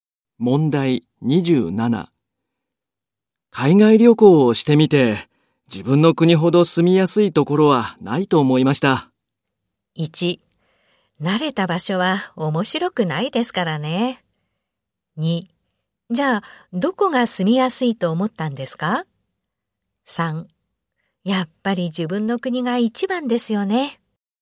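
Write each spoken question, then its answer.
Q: 海外旅行をしてみて、自分の国ほど住みやすいところはないと思いました。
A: 3: やっぱり自分の国が一番ですよね。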